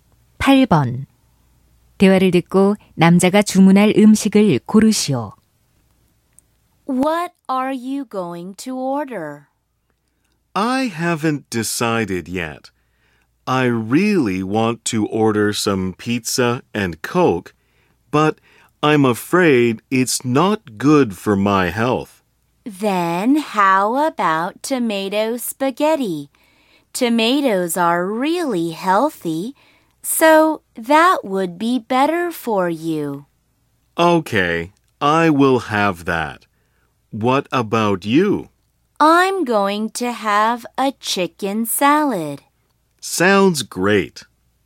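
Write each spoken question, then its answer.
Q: 대화를 듣고 남자가 주문할 음식을 고르시오.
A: 토마토 스파게티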